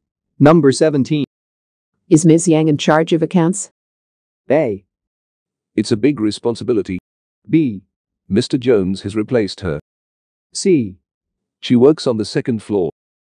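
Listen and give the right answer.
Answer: B: Mr. Jones has replaced her.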